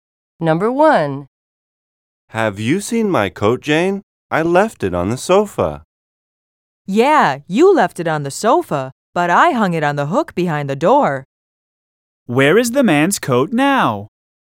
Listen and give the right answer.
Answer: The coat is hanging on a hook now.